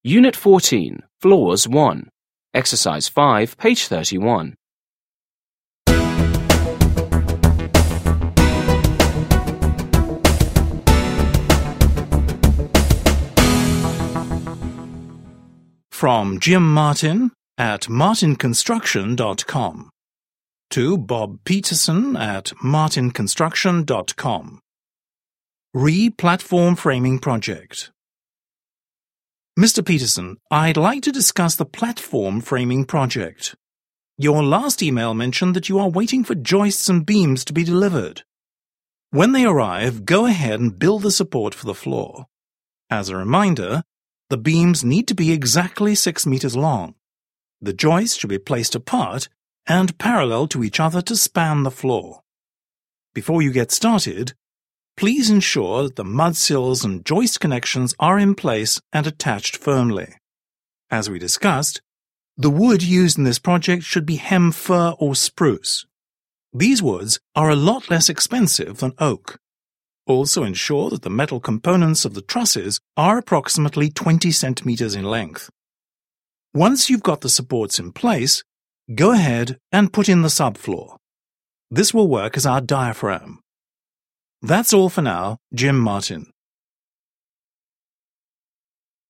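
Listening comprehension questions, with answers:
5. Listen and read the email again. What are some types of wood that will be used in this floor?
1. What are some types of wood that will be used in this floor?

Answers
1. hem fir or spruce

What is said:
Unit 14. Floors 1.
(email)
Re: platform framing project
Mr. Peterson,
I'd like to discuss the platform framing project. Your last email mentioned that you are waiting for joists and beams to be delivered. When they arrive, go ahead and build the support for the floor. As a reminder, the beams need to be exactly six meters long. The joists should be placed apart and parallel to each other to span the floor.
Before you get started, please ensure that the mudsills and joist connections are in place and attached firmly. As we discussed, the wood used in this project should be hem fir or spruce. These woods are a lot less expensive than oak. 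Also, ensure that the metal components of the trusses are approximately 20 cm in length. Once you've got the supports in place, go ahead and put in the subfloor. This will work as our diaphragm.
That's all for now. - Jim Martin.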